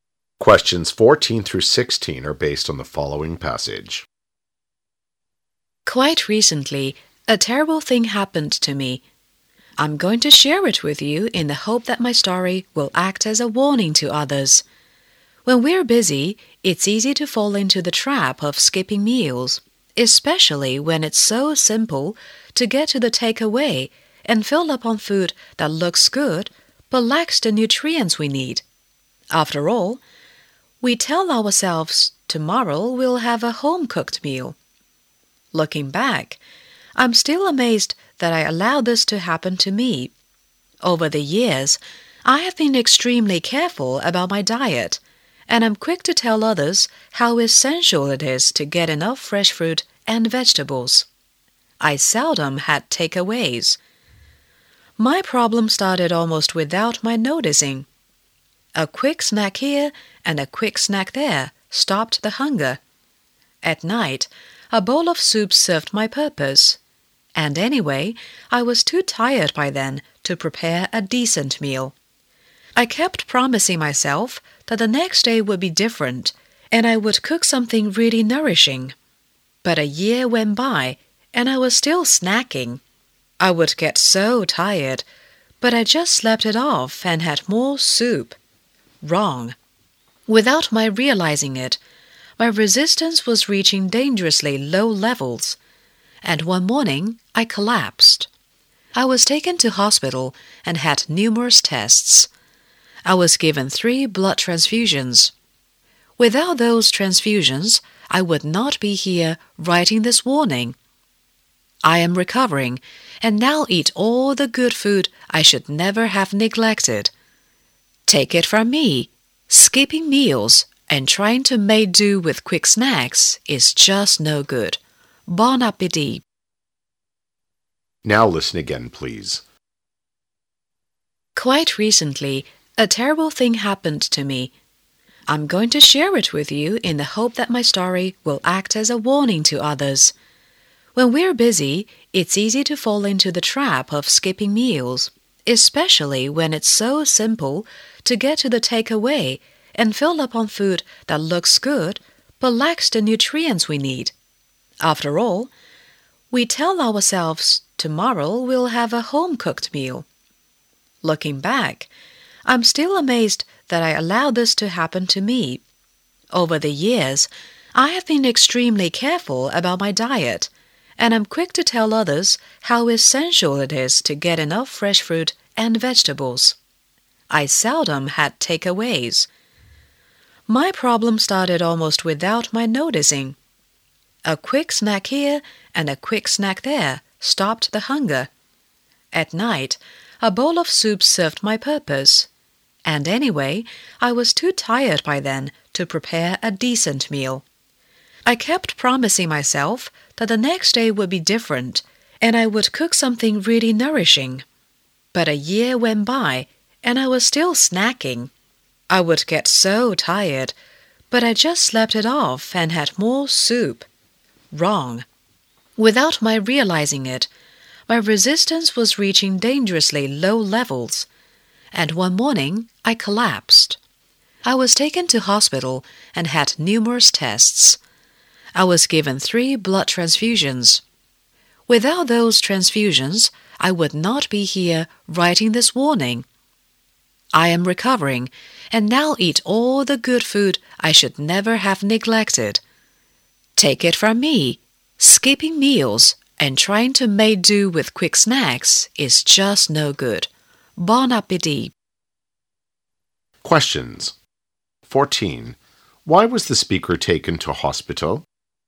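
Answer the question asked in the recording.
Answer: She collapsed after a year of skipping meals and eating only snacks.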